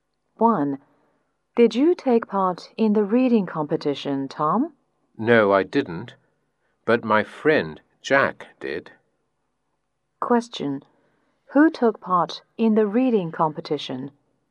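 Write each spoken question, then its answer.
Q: Who took part in the reading competition?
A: Jack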